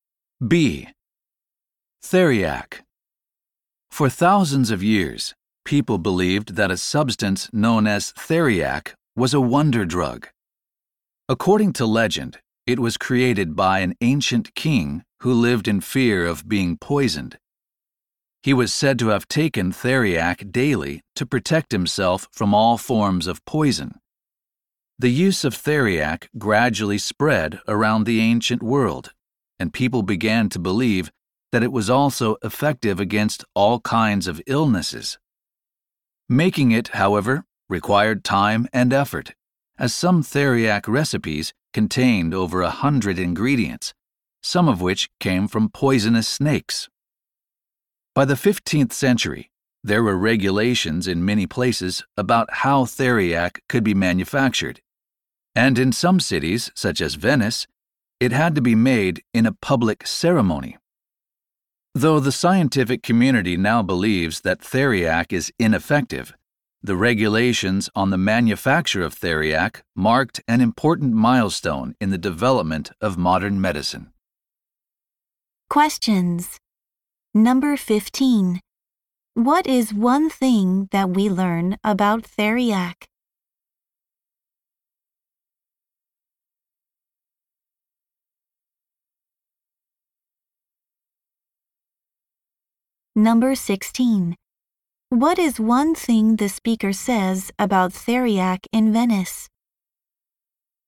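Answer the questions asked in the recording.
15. People believed it protected against all poisons and illnesses, but it is now considered ineffective.
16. It had to be made in a public ceremony.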